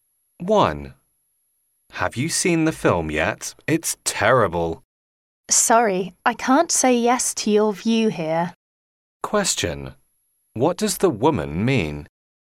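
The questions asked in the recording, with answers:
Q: What does the woman mean?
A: She disagrees; she doesn't think the film is terrible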